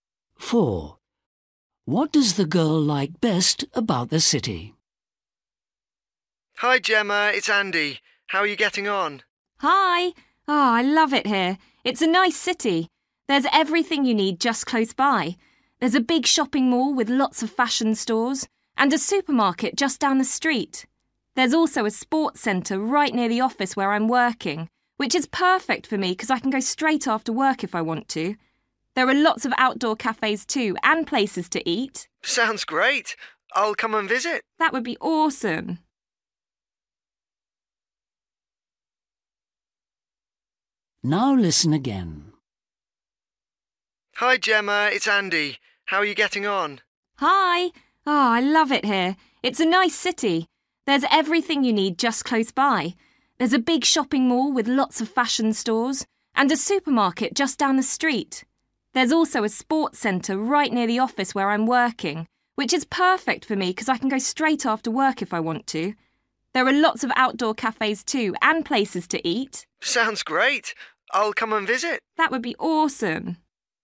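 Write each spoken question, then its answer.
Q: What does the girl like best about the city?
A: The sports centre near her office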